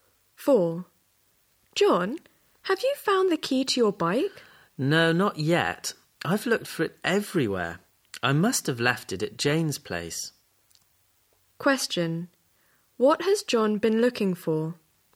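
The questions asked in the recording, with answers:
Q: What has John been looking for?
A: The key to his bike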